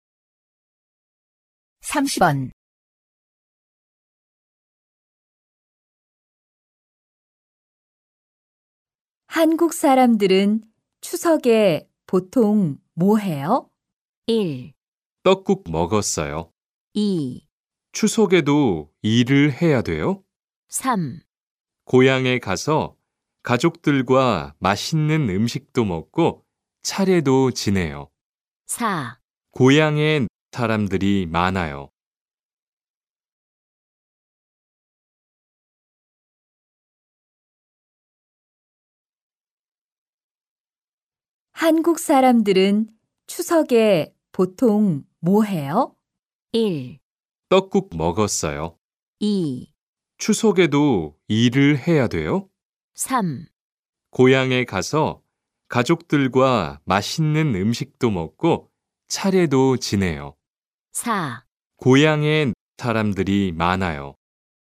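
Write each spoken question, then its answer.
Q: 한국 사람들은 추석에 보통 뭐 해요?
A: 3: 고향에 가서 가족들과 맛있는 음식도 먹고 차례도 지내요.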